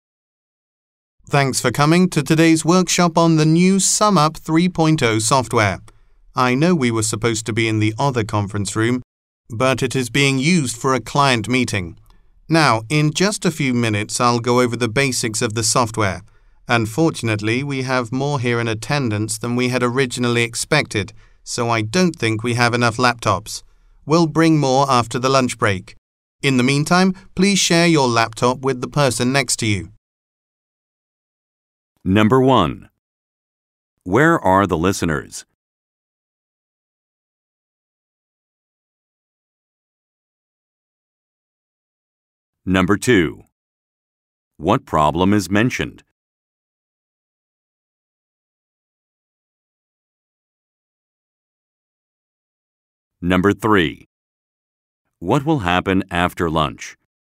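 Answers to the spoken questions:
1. At a software workshop
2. There are not enough laptops
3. More laptops will be brought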